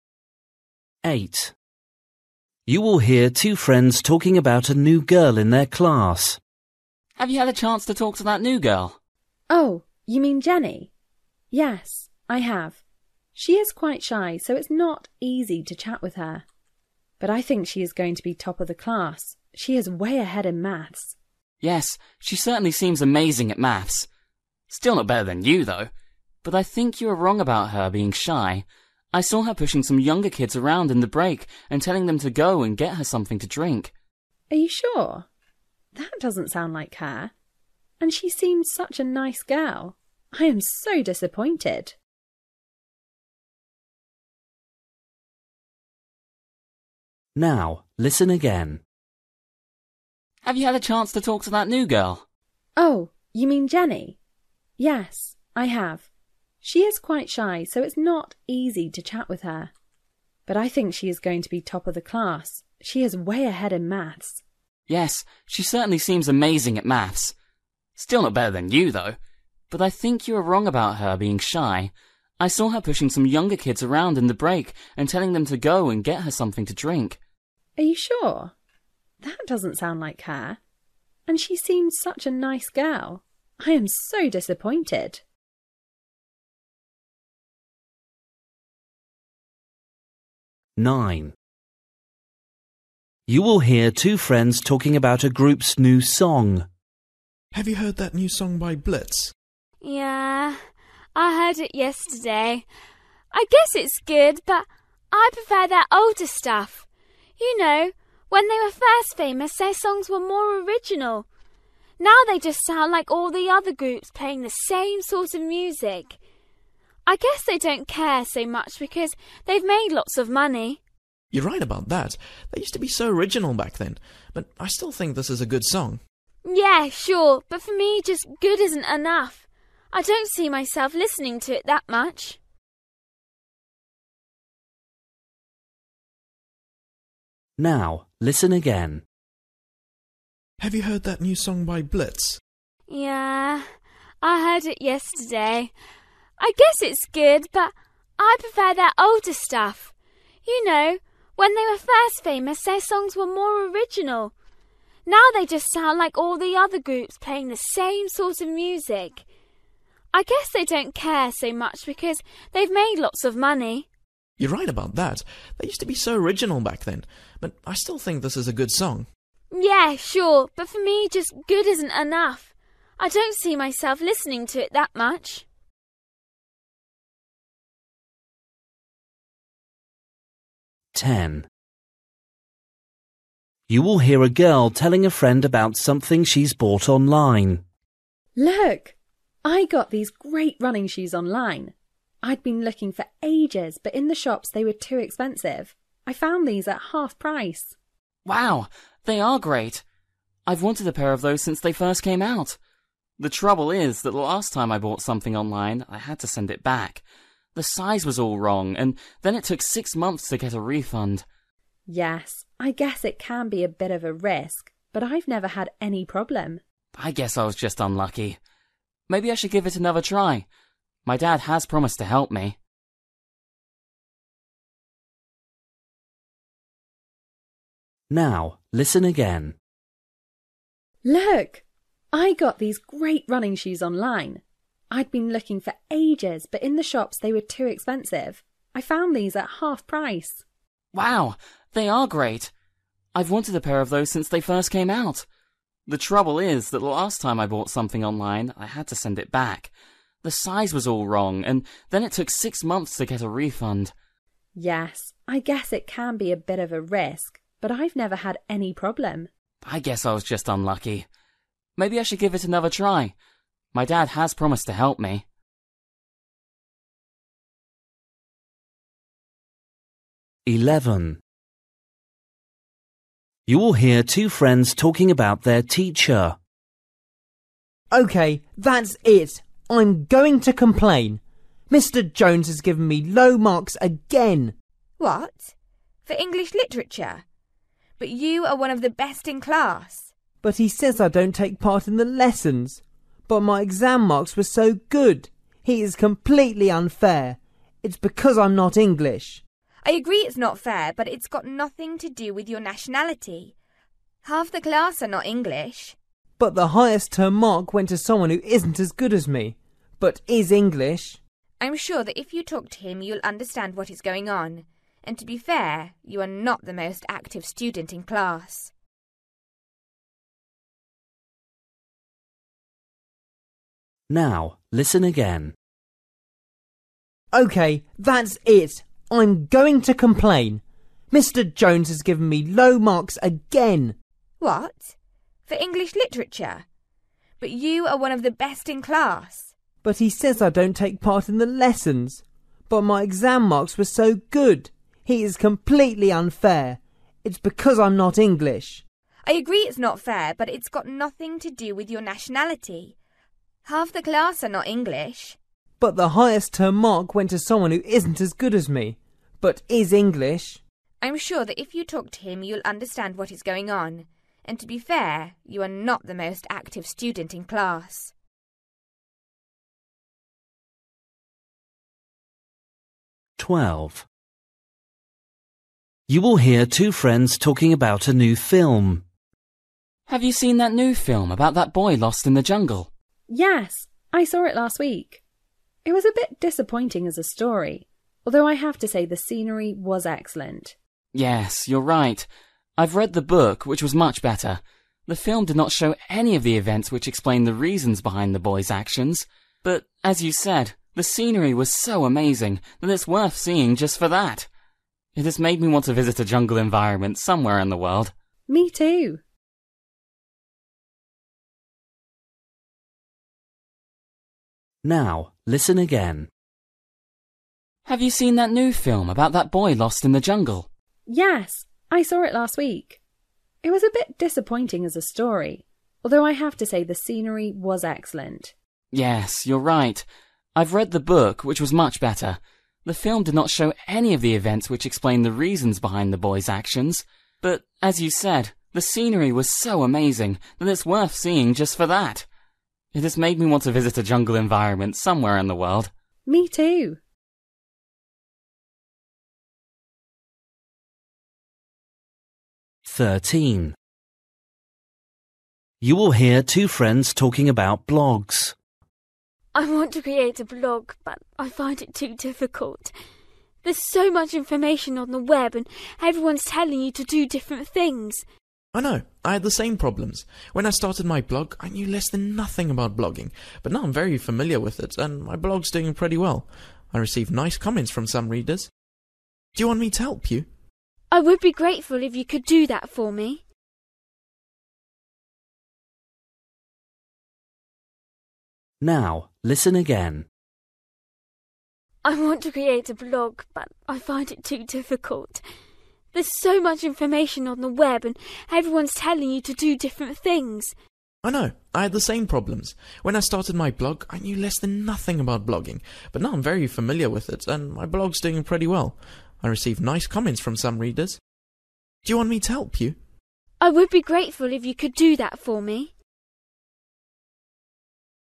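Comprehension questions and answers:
For each question, choose the correct answer.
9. You will hear two friends talking about a group's new song. They agree that.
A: the group's older songs were more original

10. You will hear a girl telling a friend about something she bought online. What does the boy say about his experience?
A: He had to send the item back and waited six months for a refund

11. You will hear two friends talking about their teacher. What do they disagree about?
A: Whether the low marks are because he is not English

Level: Luyện nghe trình độ B1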